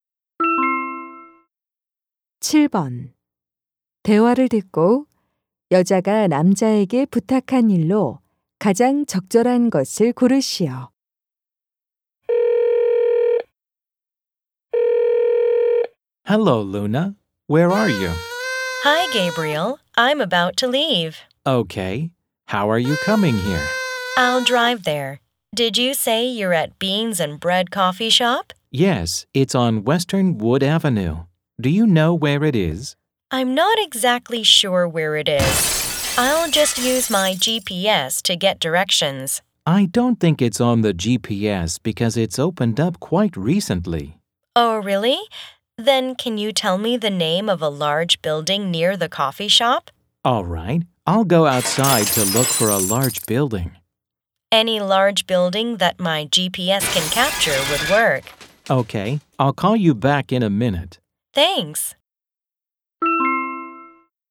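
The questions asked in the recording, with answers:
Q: 대화를 듣고 여자가 남자에게 부탁한 일로 가장 적절한 것을 고르시오.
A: 커피숍 근처의 큰 건물 이름 알려 주기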